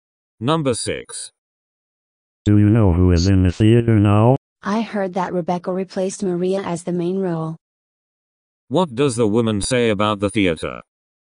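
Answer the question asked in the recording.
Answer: Rebecca replaced Maria in the main role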